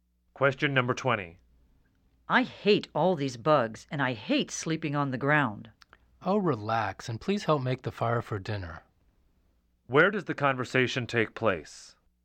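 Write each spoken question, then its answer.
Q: Where does the conversation take place?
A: At a campsite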